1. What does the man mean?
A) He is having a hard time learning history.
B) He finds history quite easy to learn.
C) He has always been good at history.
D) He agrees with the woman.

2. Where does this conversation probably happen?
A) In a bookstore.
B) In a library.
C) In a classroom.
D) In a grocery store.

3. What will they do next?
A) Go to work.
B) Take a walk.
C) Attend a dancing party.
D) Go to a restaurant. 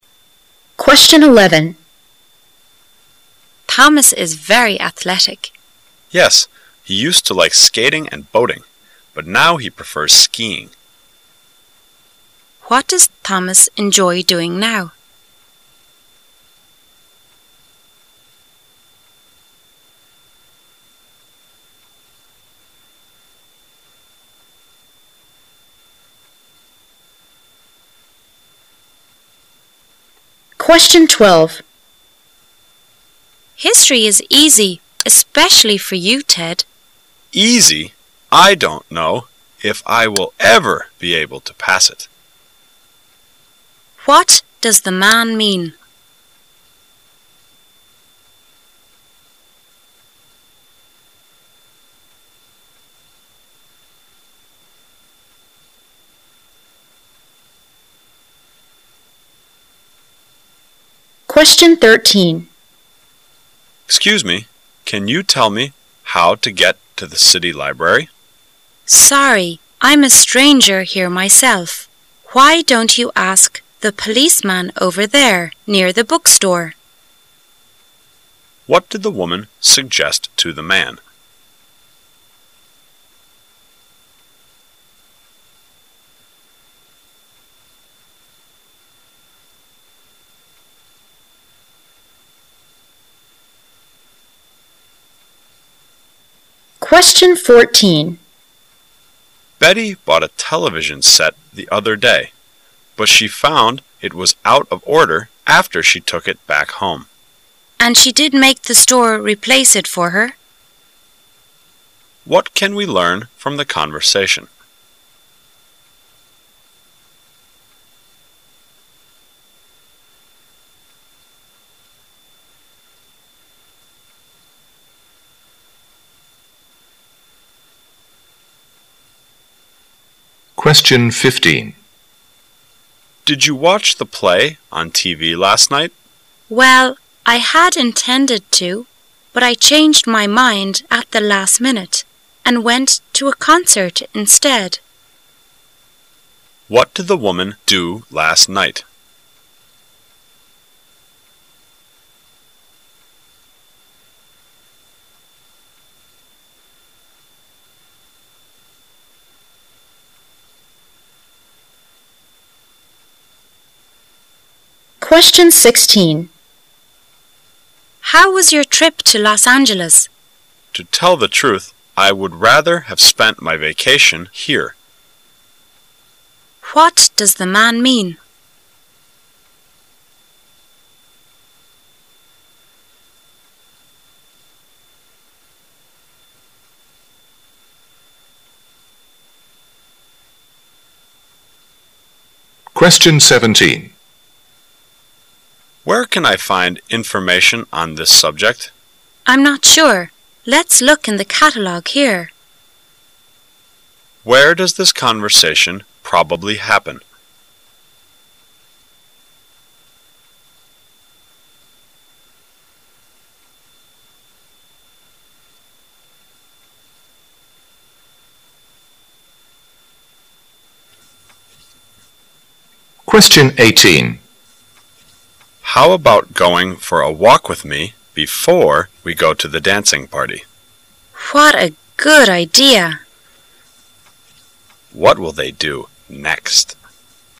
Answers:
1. He is having a hard time learning history.
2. In a library.
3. Take a walk.

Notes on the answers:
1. W: History is easy, especially for you, Ted. M: Easy? I don't know if I will ever be able to pass it. Q: What does the man mean?
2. M: Where can I find information on this subject? W: I'm not sure. Let's look in the catalog here. Q: Where does this conversation probably happen?
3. M: How about going for a walk with me before we go to the dancing party? W: What a good idea! Q: What will they do next?

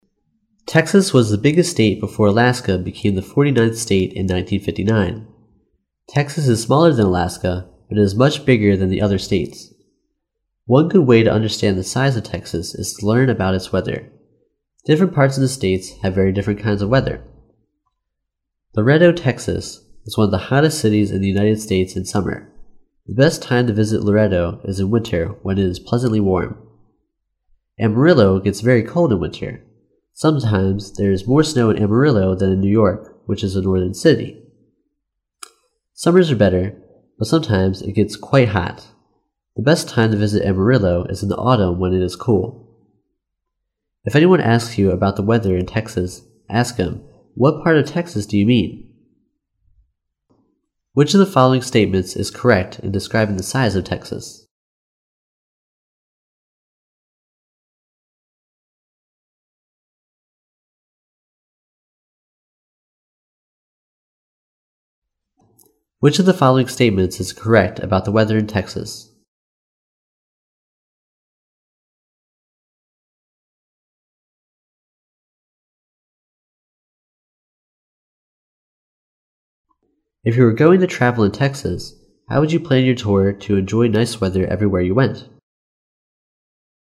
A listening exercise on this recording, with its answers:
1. Which of the following statements is correct about the weather in Texas?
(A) Texas has different kinds of weather patterns as it is a big state.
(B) Texas ranks the forty-ninth in terms of the size.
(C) Texas has the coldest place in winter in the US.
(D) Texas has the warmest place in summer in the US.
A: Texas has different kinds of weather patterns as it is a big state.

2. If you were going to travel in Texas, how would you plan your tour to enjoy nice weather everywhere you went?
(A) Visit Laredo in summer and Amarillo in winter.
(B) Visit Laredo in winter and Amarillo in summer.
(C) Visit Laredo in spring and Amarillo in autumn.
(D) Visit Laredo in winter and Amarillo in autumn.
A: Visit Laredo in winter and Amarillo in autumn.

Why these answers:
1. 细节题。从Different parts of the state have very different kinds of weather. 可以得知得克萨斯州具有多重气候类型,所以答案是A。

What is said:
[听力原文] Texas was the biggest state before Alaska became the forty-ninth state in 1959. Texas is smaller than Alaska, but it is much bigger than the other states. One good way to understand the size of Texas is to learn about its weather. Different parts of the state have very different kinds of weather. Laredo, Texas, is one of the hottest cities in the United States in summer. The best time to visit Laredo is in winter, when it is pleasantly warm. Amarillo gets very cold in winter. Sometimes there is more snow in Amarillo than in New York, which is a northern city. Summers are better, but sometimes it gets quite hot. The best time to visit Amarillo is in the autumn when it is cool. If anyone asks you about the weather in Texas, ask him, "What part of Texas do you mean?"
Which of the following statements is correct in describing the size of Texas?

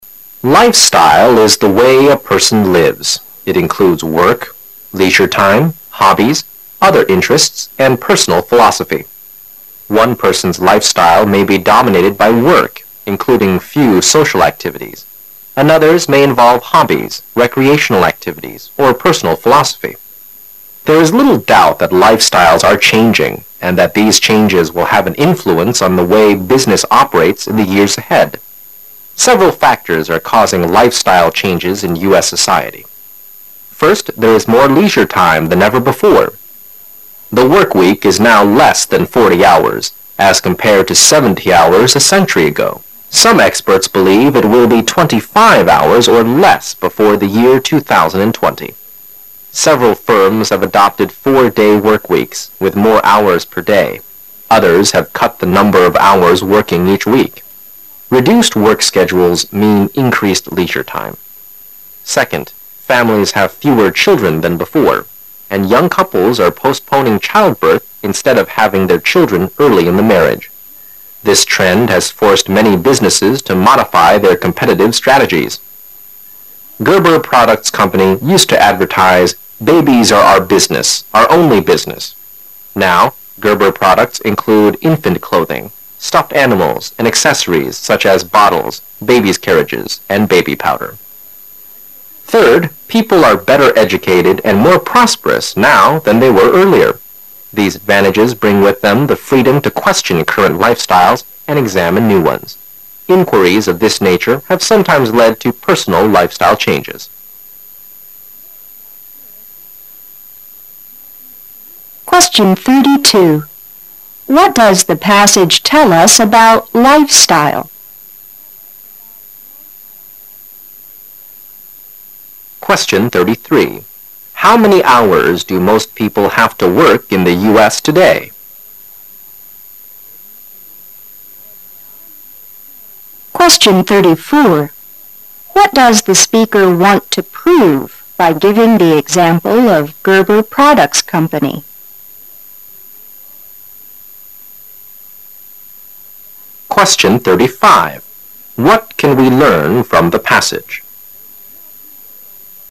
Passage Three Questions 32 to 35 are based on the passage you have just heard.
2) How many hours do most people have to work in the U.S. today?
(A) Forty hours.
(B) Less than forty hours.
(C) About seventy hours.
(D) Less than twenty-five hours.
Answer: Less than forty hours.

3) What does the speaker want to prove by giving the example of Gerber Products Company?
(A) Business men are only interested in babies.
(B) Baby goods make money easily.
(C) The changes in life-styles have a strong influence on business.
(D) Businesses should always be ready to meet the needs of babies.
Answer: The changes in life-styles have a strong influence on business.

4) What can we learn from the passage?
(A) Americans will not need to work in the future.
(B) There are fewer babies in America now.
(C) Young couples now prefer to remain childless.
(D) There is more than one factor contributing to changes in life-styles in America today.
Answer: There is more than one factor contributing to changes in life-styles in America today.

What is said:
[解析] 32-35 Life-style is the way a person lives; it includes work, leisure time, hobbies, other interests, and personal philosophy. One person's life-style may be dominated by work, including few social activities. Another's may involve hobbies, recreational activities, or personal philosophy. There is little doubt that life-styles are changing and that these changes will have an influence on the way business operates in the years ahead. Several factors are. causing life-style changes in U.S. society. First, there is more leisure time than ever before. The workweek is now less than forty hours, as compared to seventy hours a century ago. Some experts believe it will be twenty-five hours or less before the year 2020. Several firms have adopted four-day workweeks with more hours per day. Others have cut the number of hours working each week. Reduced work schedules mean increased leisure time. Second, families have fewer children than before -- and young couples are postponing childbirth instead of having their children early in the marriage. This trend has forced many businesses to modify their competitive strategies. Gerber Products Company used to advertise "babies are our business -- our only business." Now Gerber products include infant clothing, stuffed animals, and accessories such as bottles, baby's carriages, and baby powder. Third, people are better educated and more prosperous now than they were earlier. These advantages bring with them the freedom to question current life-styles and examine new ones. Inquiries of this nature have sometimes led to personal life-style changes. 32. What does the passage tell us about life-style?

